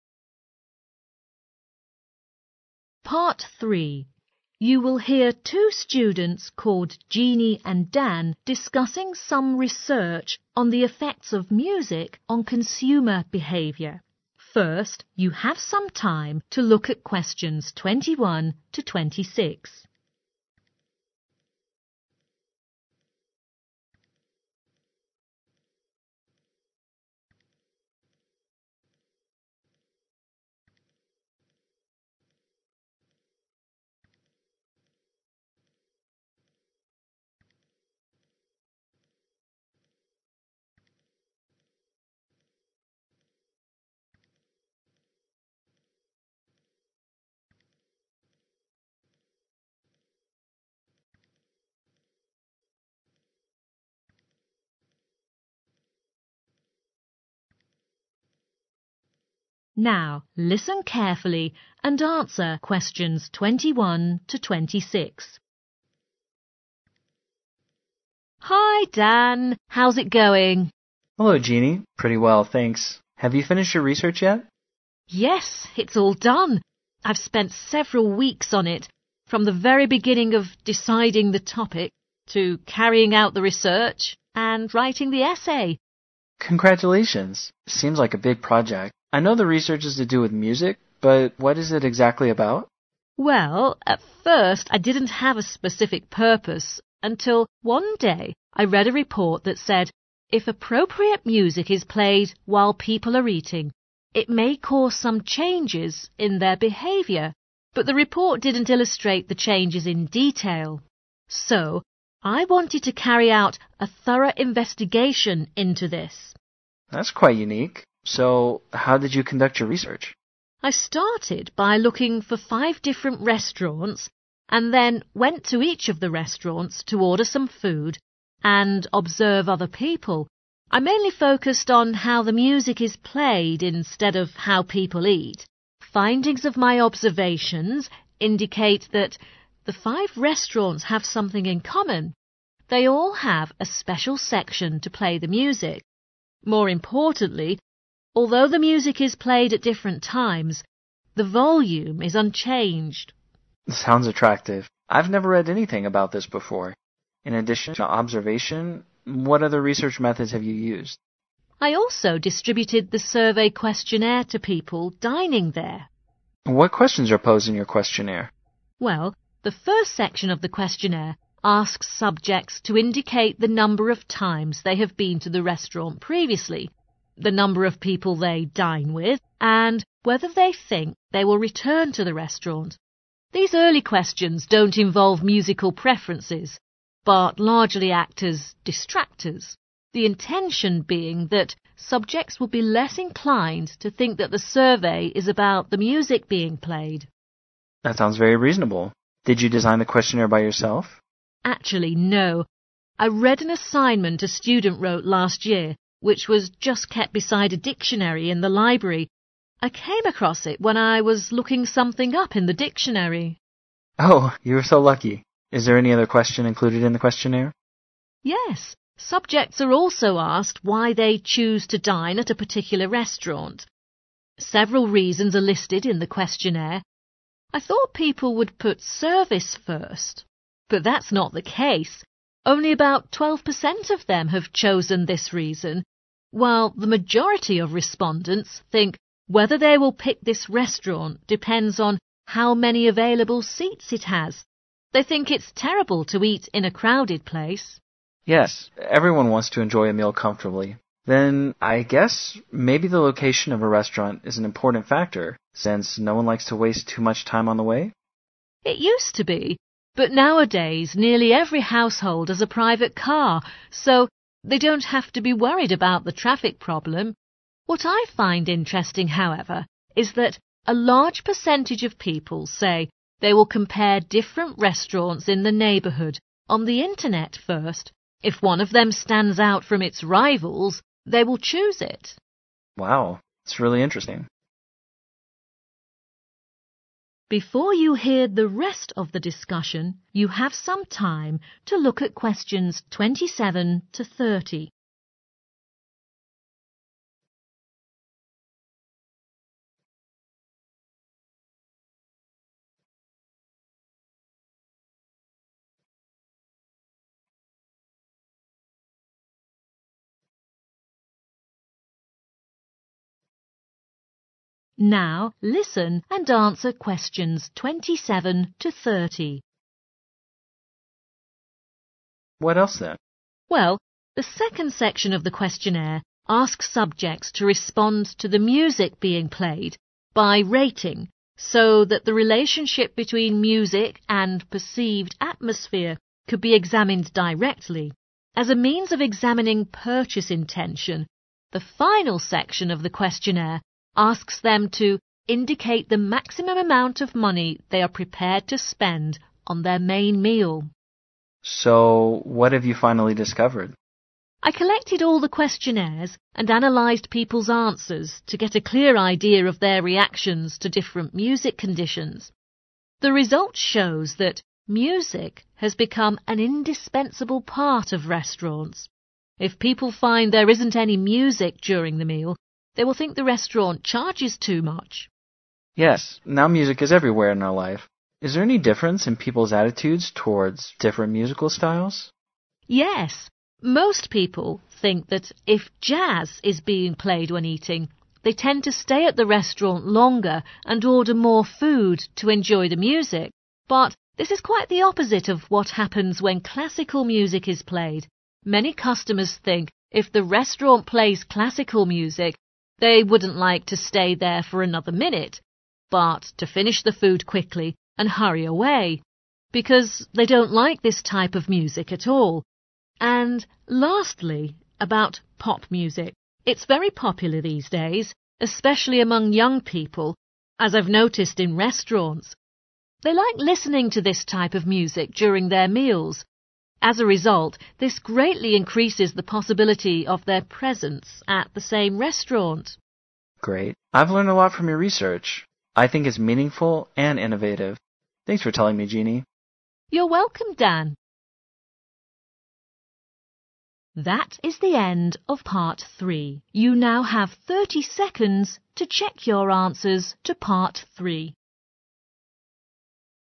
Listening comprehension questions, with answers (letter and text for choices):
Choose the correct letters, A, B or C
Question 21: What is the topic of the research?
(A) the effect of music on consumers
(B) the effect of music on eating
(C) the effect of music on the price of food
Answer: (A) the effect of music on consumers

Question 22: The research finds out in the restaurant:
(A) the music is played everywhere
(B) the music is played at a uniform volume level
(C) the music is played at a certain time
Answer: (B) the music is played at a uniform volume level

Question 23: The first few questions in the questionnaire are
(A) to understand people's taste in music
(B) to clarify the research aim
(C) to disguise the purpose of the survey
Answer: (C) to disguise the purpose of the survey

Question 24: the questions in the questionnaire came from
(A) a previous study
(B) a professional dictionary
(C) the student herself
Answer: (A) a previous study